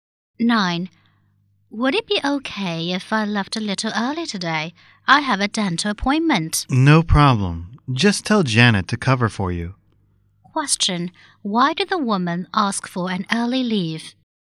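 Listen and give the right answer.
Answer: She has a dental appointment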